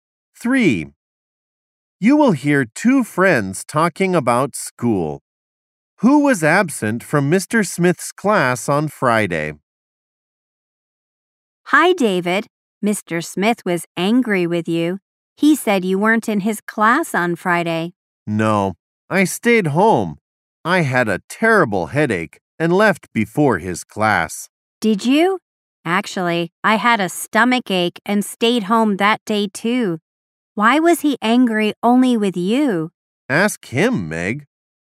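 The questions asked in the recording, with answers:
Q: Who was absent from Mr. Smith's class on Friday?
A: Both David and Meg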